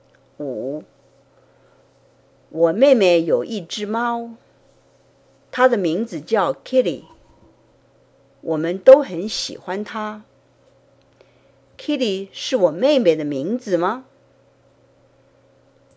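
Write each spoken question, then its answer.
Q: Kitty 是我妹妹的名字吗?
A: 不是,是猫的名字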